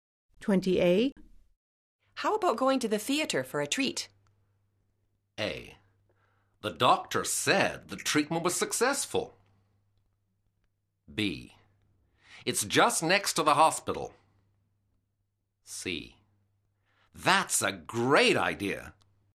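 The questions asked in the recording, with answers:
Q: How about going to the theater for a treat?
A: C: That's a great idea.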